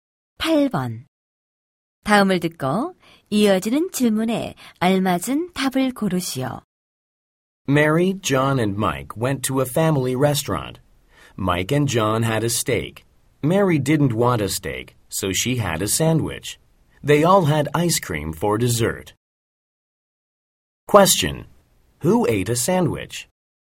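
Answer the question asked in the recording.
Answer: Mary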